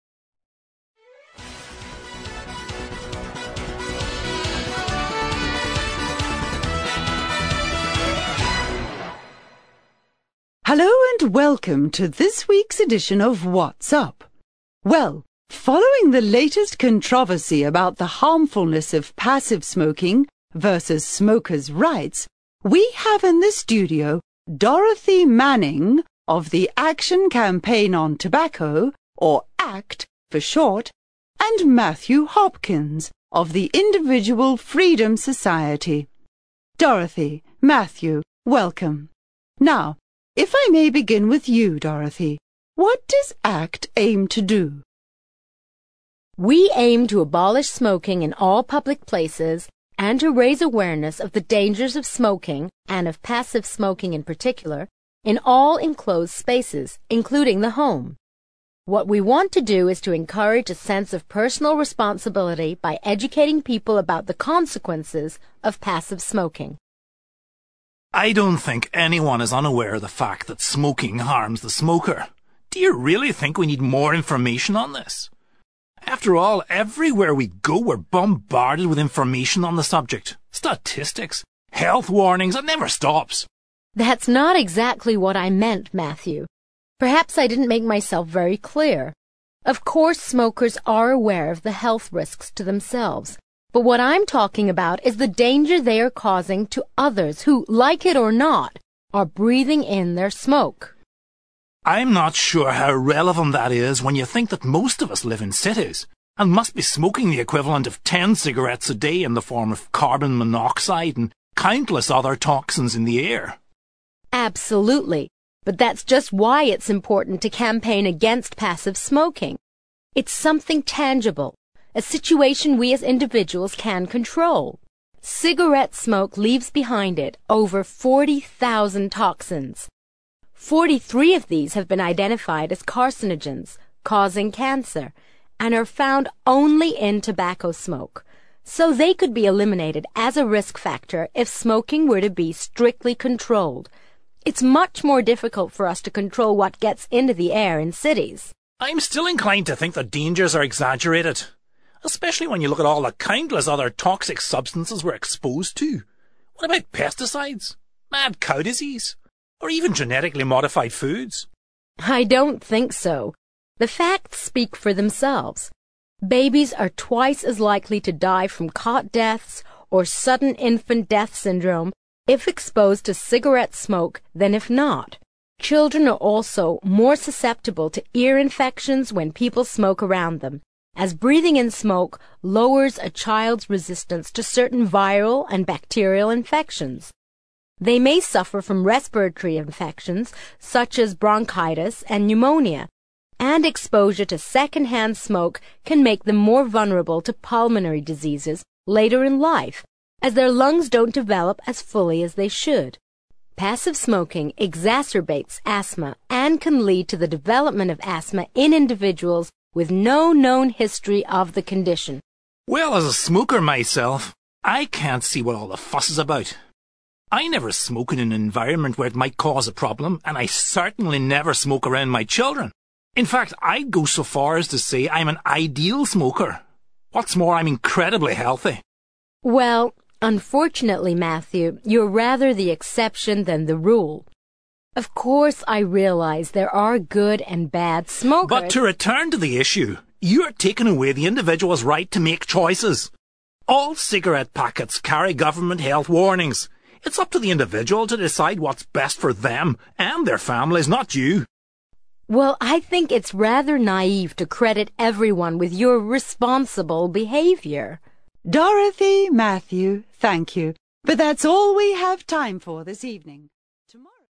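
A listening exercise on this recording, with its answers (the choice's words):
For questions 23-28 decide whether the opinions are expressed by only one of the speakers (choose DOROTHY or MATTHEW), or whether both speakers agree (choose BOTH).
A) DOROTHY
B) MATTHEW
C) BOTH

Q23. People need to be more aware of the effects of their actions.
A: DOROTHY

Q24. Smokers are not ignorant of the effects of smoking on their health.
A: BOTH

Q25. Cigarette smoke is not the only harmful substance in the atmosphere.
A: BOTH

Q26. Passive smoking is a health risk that can be dealt with.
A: DOROTHY

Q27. Not all smokers are inconsiderate of others.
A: BOTH

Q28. People can make their own decisions about their health.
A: MATTHEW

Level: CPE Proficiency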